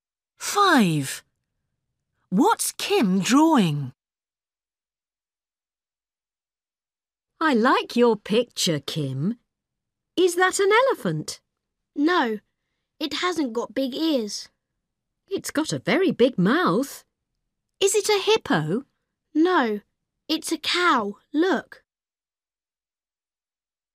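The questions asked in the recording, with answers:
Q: What's Kim drawing?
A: a cow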